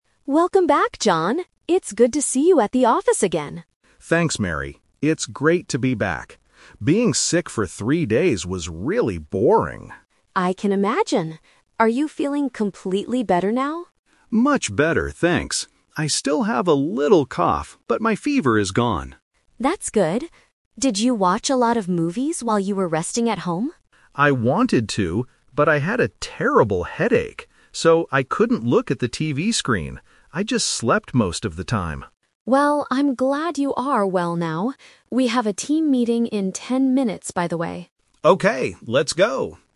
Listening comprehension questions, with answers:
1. How long was John away from work?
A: Three days.

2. How is John feeling right now?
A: He still has a little cough.

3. What did John do most of the time when he was at home?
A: He slept.

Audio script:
Mary: Welcome back, John! It's good to see you at the office again.
John: Thanks, Mary. It's great to be back. Being sick for three days was really boring.
Mary: I can imagine. Are you feeling completely better now?
John: Much better, thanks. I still have a little cough, but my fever is gone.
Mary: That's good. Did you watch a lot of movies while you were resting at home?
John: I wanted to, but I had a terrible headache. So, I couldn't look at the TV screen. I just slept most of the time.
Mary: Well, I'm glad you are well now.